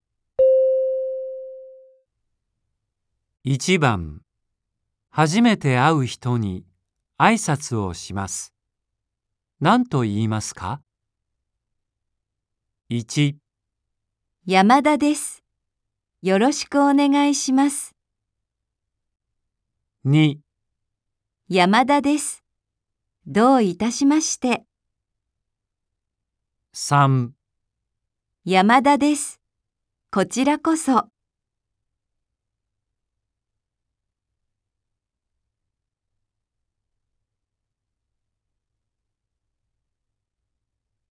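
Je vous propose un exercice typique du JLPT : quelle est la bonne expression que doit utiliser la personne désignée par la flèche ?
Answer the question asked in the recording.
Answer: 山田です。よろしくお願いします。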